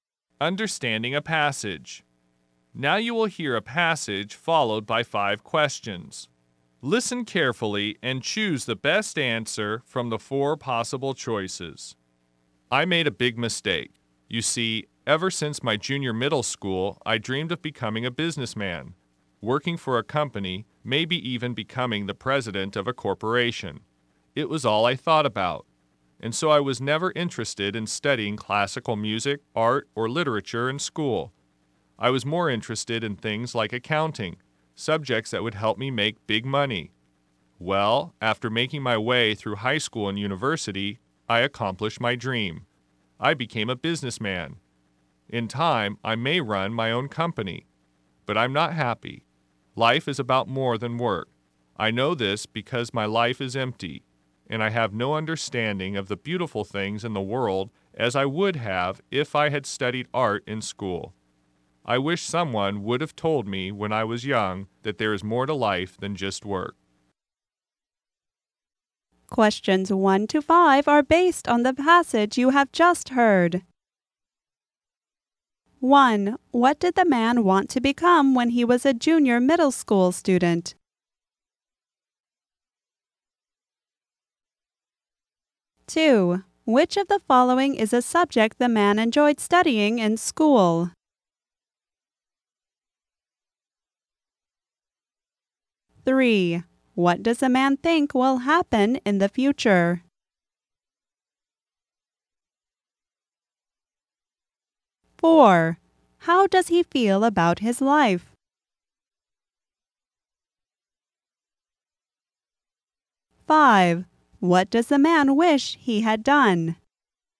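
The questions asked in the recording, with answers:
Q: What did the man want to become when he was a junior middle school student?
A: A businessman

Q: Which of the following is a subject the man enjoyed studying in school?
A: Accounting

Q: What does a man think will happen in the future?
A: He may run his own company

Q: How does he feel about his life?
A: Unhappy; his life is empty

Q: What does the man wish he had done?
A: Studied art and learned there is more to life than work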